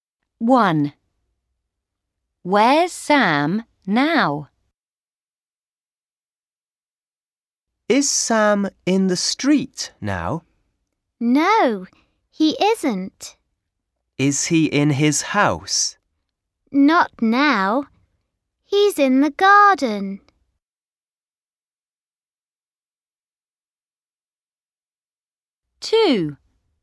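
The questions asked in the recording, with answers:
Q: Where's Sam now?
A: In the garden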